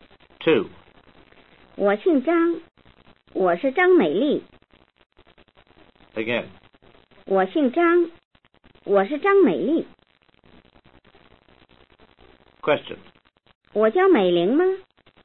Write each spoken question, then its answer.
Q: 我叫美玲吗?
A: 你不叫美玲,你叫美丽.